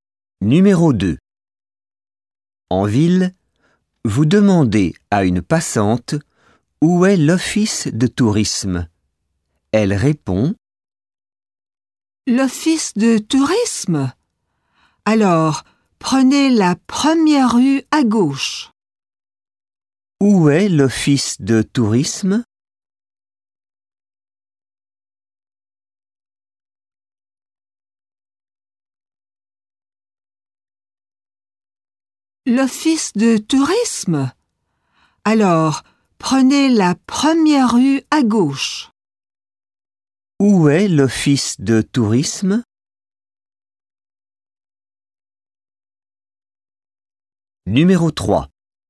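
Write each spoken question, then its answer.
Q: Où est l'office de tourisme?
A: La première rue à gauche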